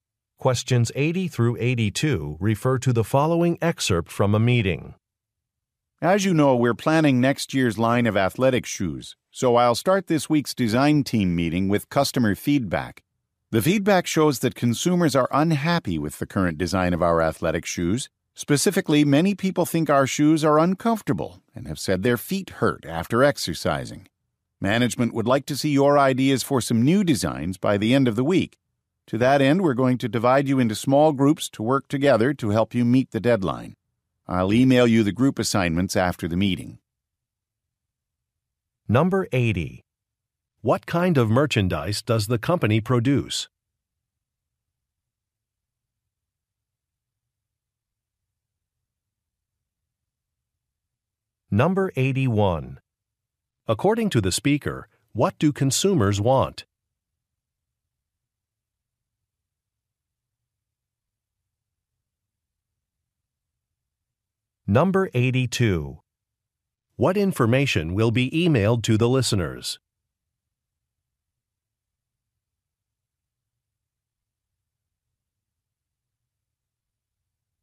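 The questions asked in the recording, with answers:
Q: What kind of merchandise does the company produce?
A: Athletic shoes

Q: According to the speaker, what do consumers want?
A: More comfortable shoes

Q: What information will be emailed to the listeners?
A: Group assignments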